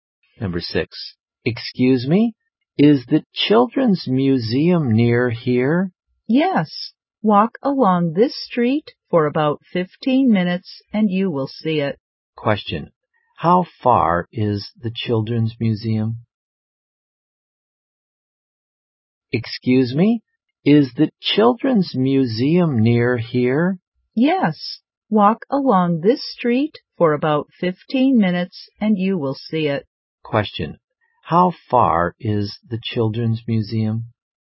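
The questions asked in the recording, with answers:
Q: how far is the Children's Museum?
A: About 15 minutes' walk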